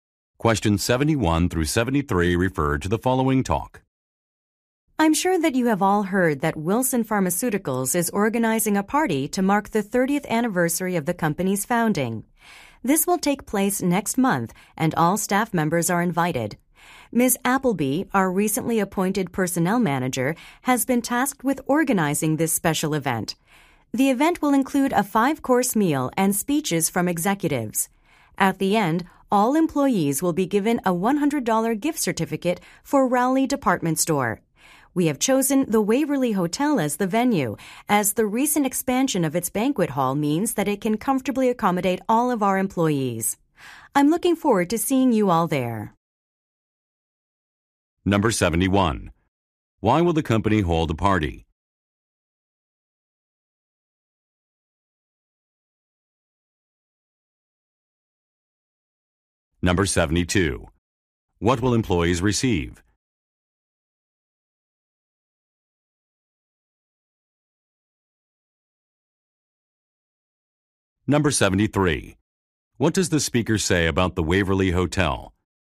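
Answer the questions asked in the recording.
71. To celebrate its 30th anniversary
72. A $100 gift certificate for Rowley Department Store
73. Its banquet hall was recently expanded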